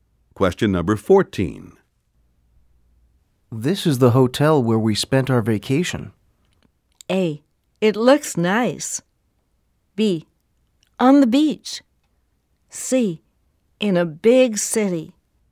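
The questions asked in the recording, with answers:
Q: This is the hotel where we spent our vacation.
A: A: It looks nice.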